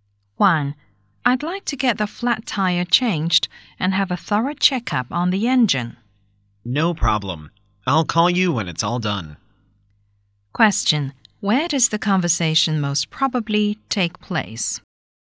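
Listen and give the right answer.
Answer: At a garage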